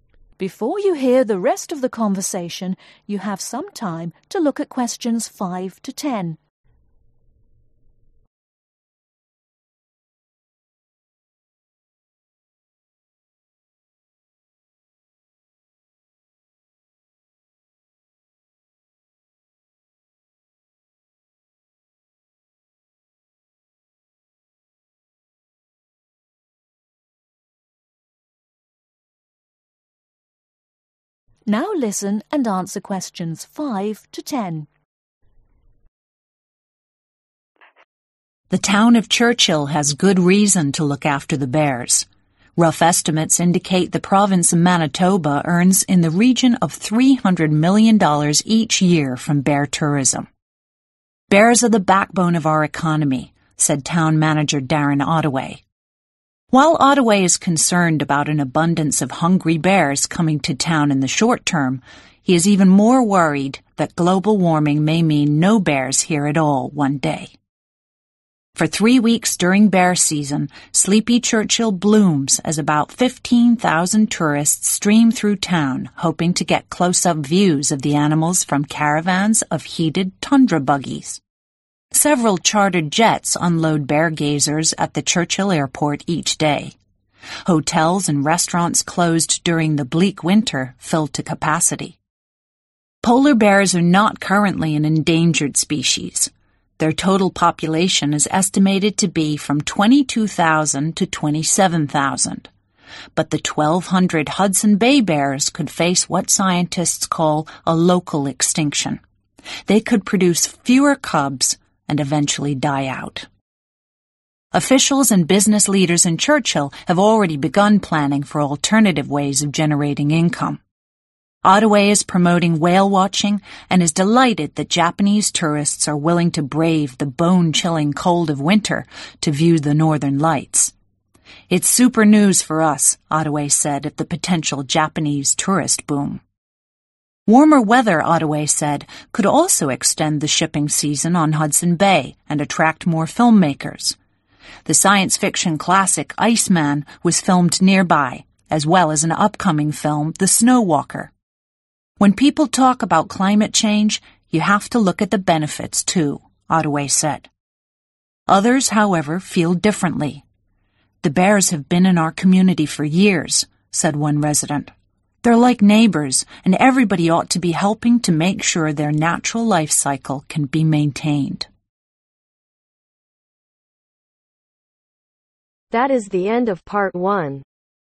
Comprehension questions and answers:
Complete the information below. Write NO MORE THAN TWO WORDS OR A NUMBER for each answer.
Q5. How much does Manitoba Province earn in one year from Bear Tourism ?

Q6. What might cause the bears to disappear according to Darren Ottaway ?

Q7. What do tourists come to do ?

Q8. What is the estimated number of Hudson Bay Bears ?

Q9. What dp Japanese tourists want to see ?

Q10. Which movie, filmed in Churchill is yet to be released the ?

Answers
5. $300 Million
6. Global Warming
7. View Bears
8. 1200
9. Northern Lights
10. Snow Walker